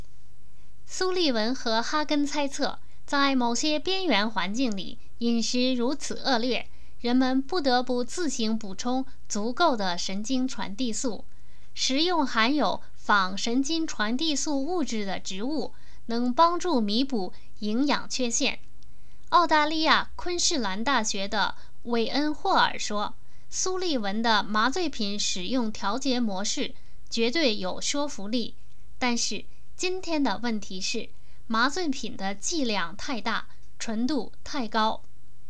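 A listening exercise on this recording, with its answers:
如今的毒品与传统的有什么不同?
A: 剂量太大,纯度太高

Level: 3rd Year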